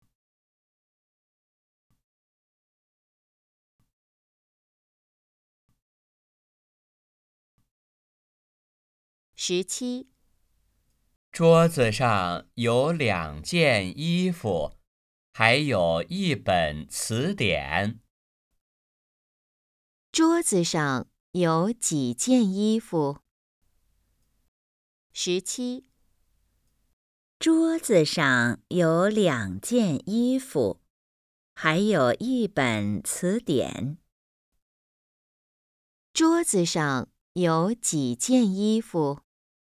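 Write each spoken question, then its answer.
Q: 桌子上有几件衣服?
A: 两件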